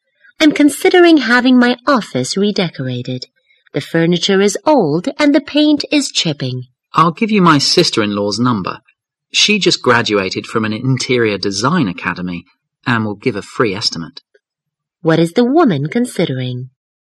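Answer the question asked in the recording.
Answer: Having her office redecorated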